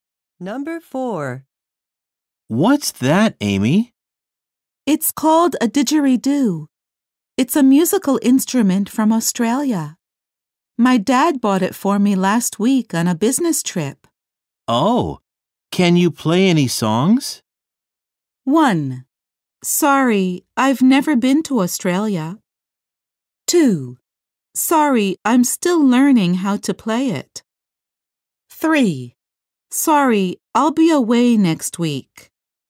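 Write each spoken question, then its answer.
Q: Oh, can you play any songs?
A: 2: Sorry, I'm still learning how to play it.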